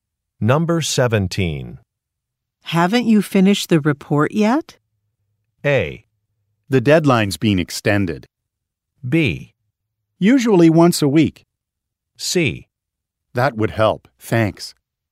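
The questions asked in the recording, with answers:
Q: Haven't you finished the report yet?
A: A: The deadline's been extended.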